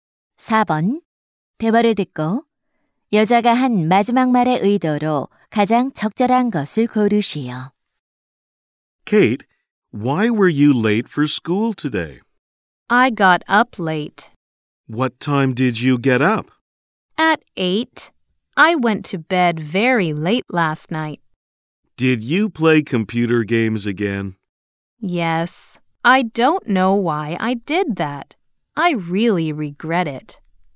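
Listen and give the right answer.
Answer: 후회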